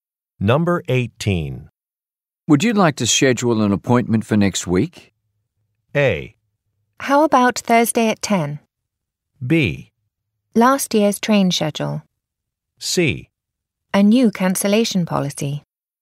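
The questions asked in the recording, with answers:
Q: Would you like to schedule an appointment for next week?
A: A: How about Thursday at 10?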